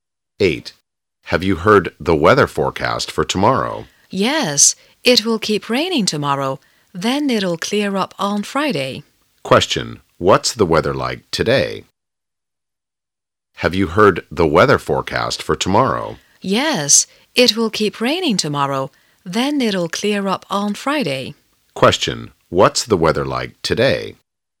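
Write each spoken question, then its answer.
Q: What's the weather like today?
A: It's raining.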